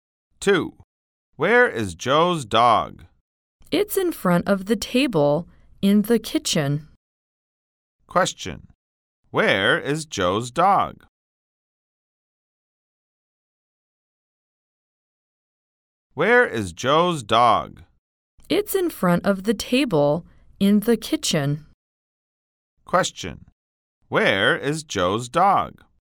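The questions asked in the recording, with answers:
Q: Question. Where is Joe's dog?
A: In front of the table in the kitchen.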